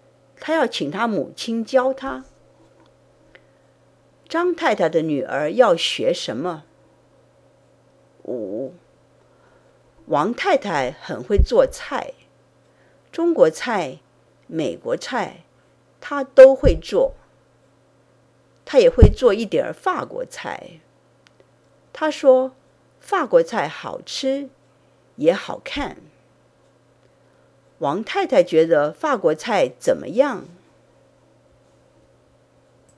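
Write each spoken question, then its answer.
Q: 王太太觉得法国菜怎么样?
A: 好吃,也好看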